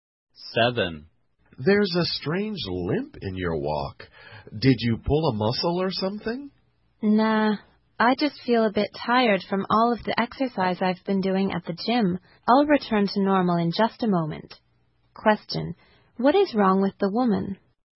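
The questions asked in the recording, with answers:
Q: What is wrong with the woman?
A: She is a bit tired from exercising at the gym.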